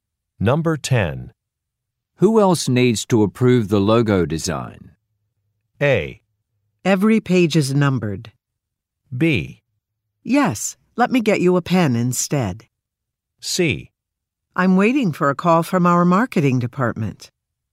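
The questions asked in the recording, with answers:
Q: Who else needs to approve the logo design?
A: C: I'm waiting for a call from our marketing department.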